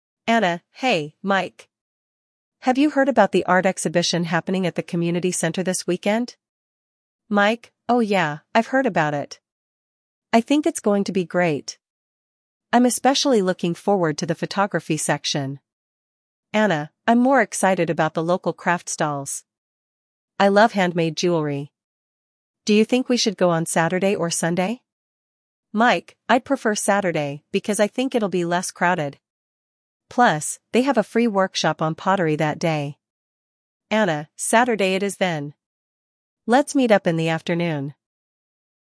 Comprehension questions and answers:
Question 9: What event are Anna and Mike discussing?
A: An art exhibition.

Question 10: What section of the exhibition is Mike looking forward to?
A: The photography section.

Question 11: What activity does Anna enjoy at the exhibition?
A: Handmade jewelry.

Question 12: Why does Mike prefer Saturday over Sunday?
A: Saturday, because it will be less crowded.

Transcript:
Anna: Hey, Mike! Have you heard about the art exhibition happening at the community center this weekend?
Mike: Oh yeah, I've heard about it. I think it's going to be great. I'm especially looking forward to the photography section.
Anna: I'm more excited about the local craft stalls. I love handmade jewelry. Do you think we should go on Saturday or Sunday?
Mike: I'd prefer Saturday because I think it'll be less crowded. Plus, they have a free workshop on pottery that day.
Anna: Saturday it is then! Let's meet up in the afternoon.